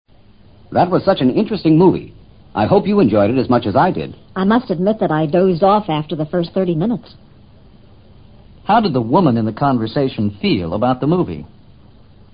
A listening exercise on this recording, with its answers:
How did the woman in the conversation feel about the movie?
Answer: She found it boring.

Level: 世博高级听说